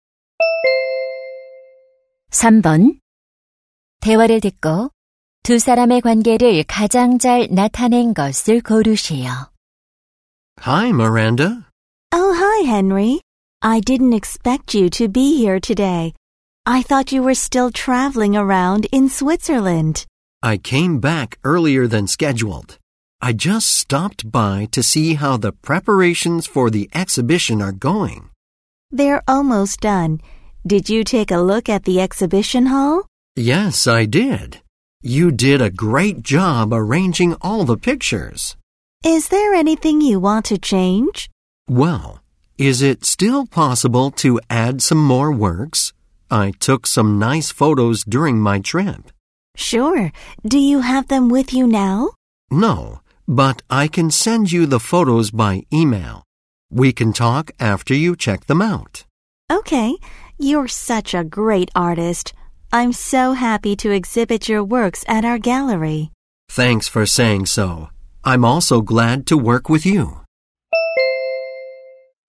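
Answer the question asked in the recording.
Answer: 사진작가 – 갤러리 전시 담당자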